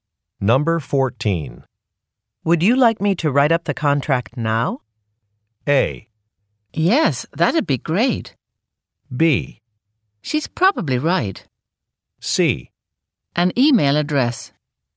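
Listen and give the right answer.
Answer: A: Yes, that'd be great.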